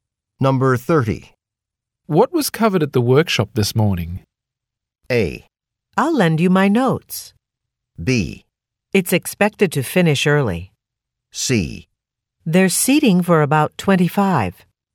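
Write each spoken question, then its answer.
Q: What was covered at the workshop this morning?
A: A: I'll lend you my notes.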